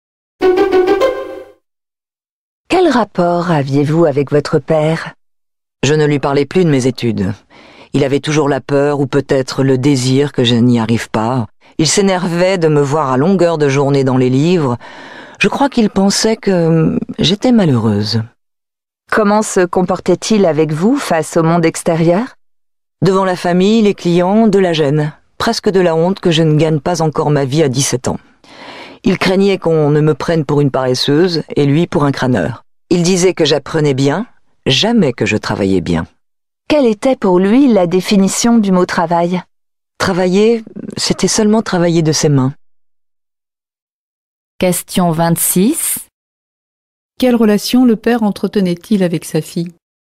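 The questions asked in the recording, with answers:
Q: Quelle relation le père entretenait-il avec sa fille?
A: Il ne comprenait pas ses études et en avait honte.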